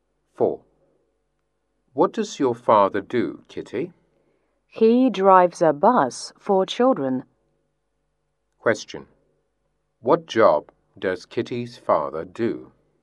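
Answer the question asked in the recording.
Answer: He is a bus driver (for children)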